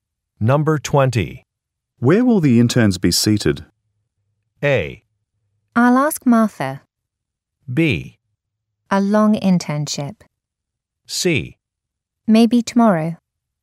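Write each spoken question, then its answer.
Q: Where will the interns be seated?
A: A: I'll ask Martha.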